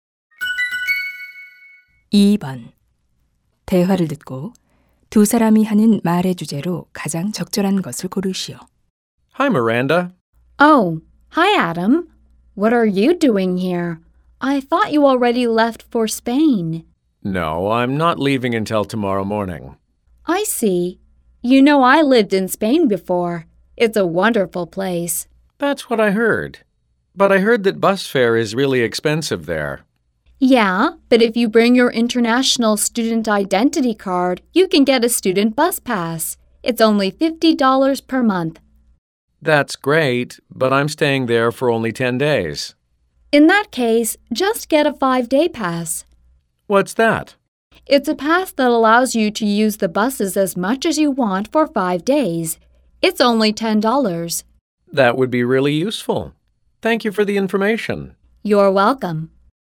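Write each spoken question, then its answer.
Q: 대화를 듣고 두 사람이 하는 말의 주제로 가장 적절한 것을 고르시오.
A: 스페인의 버스 이용권 정보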